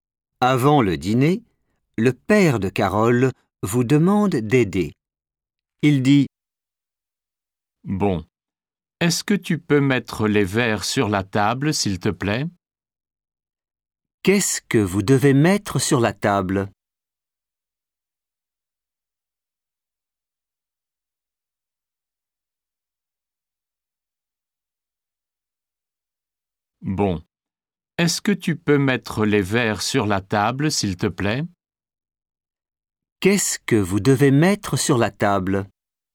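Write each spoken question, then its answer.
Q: Qu'est-ce que vous devez mettre sur la table ?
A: les verres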